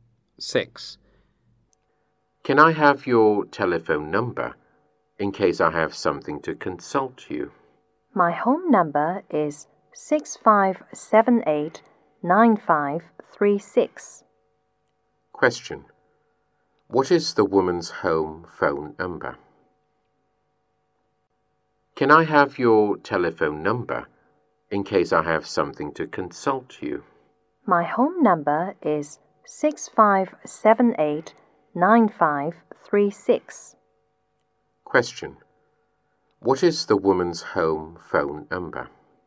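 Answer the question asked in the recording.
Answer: 6578-9536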